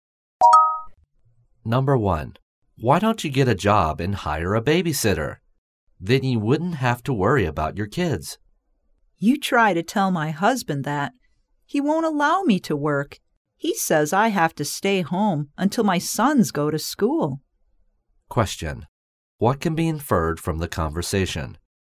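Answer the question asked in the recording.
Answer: The woman's husband won't let her work; she must stay home with the children until they go to school.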